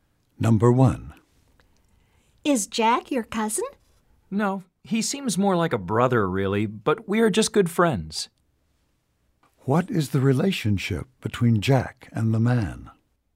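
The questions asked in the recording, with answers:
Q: What is the relationship between Jack and the man?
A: They are friends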